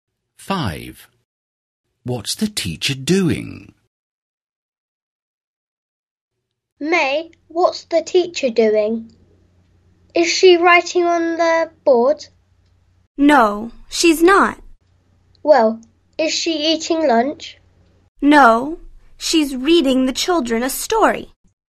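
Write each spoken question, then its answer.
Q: What's the teacher doing?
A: Reading the children a story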